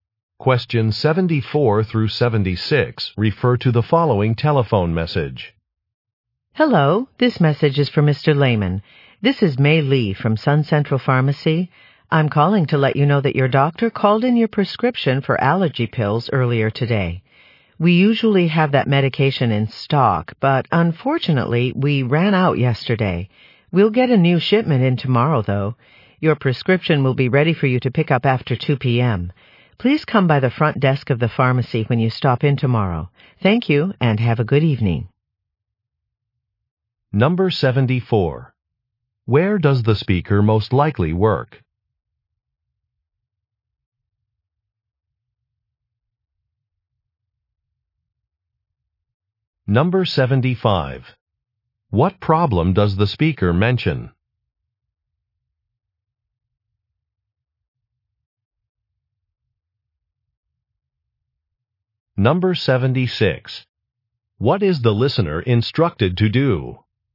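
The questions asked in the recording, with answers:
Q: Where does the speaker most likely work?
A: At a pharmacy

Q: What problem does the speaker mention?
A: The medication is out of stock

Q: What is the listener instructed to do?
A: Come by the pharmacy's front desk tomorrow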